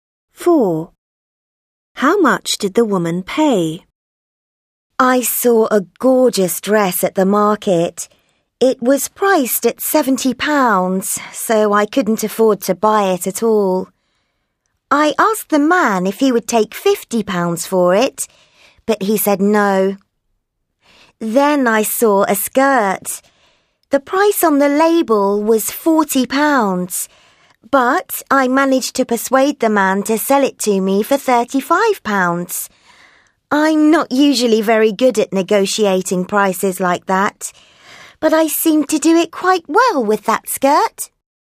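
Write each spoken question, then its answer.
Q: How much did the woman pay?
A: £35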